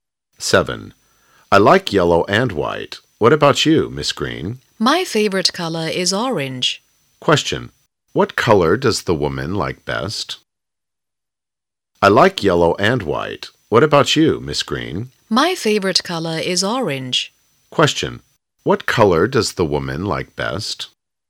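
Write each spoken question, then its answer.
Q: Question. What color does the woman like best?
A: Orange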